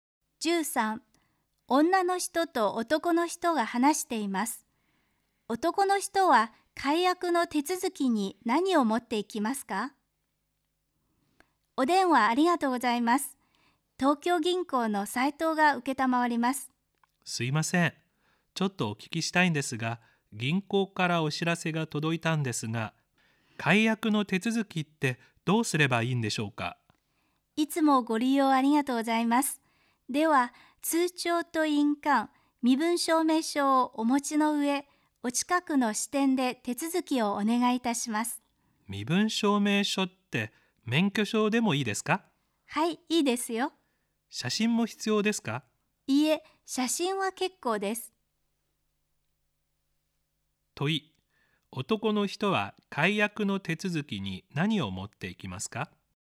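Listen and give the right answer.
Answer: 通帳と印鑑と免許証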